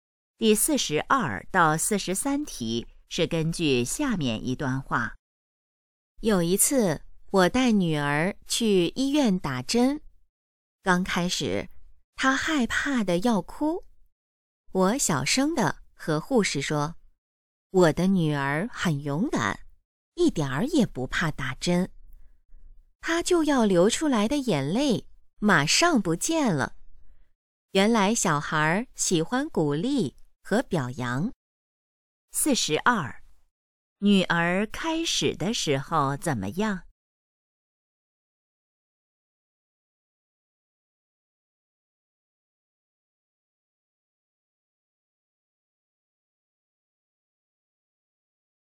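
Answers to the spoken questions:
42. 害怕得要哭
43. 小孩喜欢鼓励和表扬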